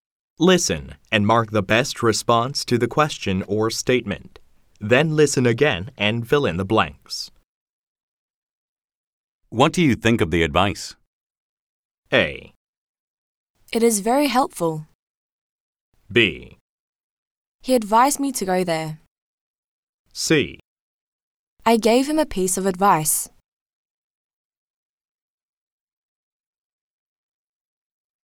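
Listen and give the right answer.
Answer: A: It is very helpful.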